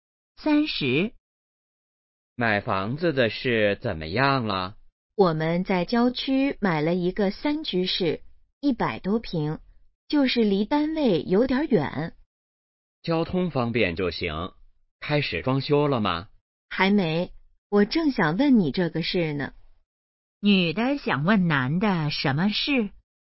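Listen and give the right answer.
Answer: 装修的事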